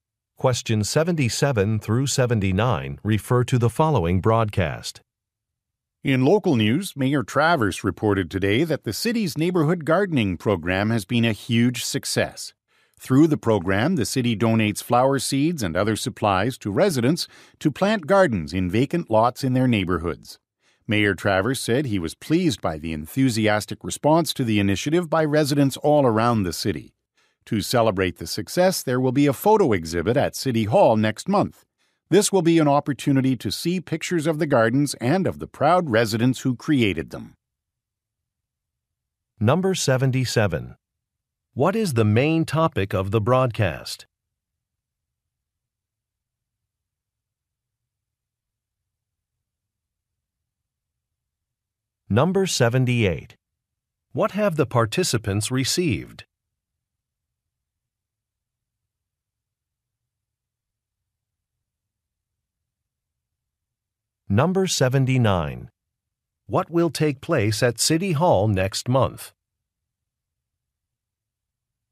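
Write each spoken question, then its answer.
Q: What is the main topic of the broadcast?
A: The city's neighborhood gardening program

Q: What have the participants received?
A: Flower seeds and other supplies

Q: What will take place at City Hall next month?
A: A photo exhibit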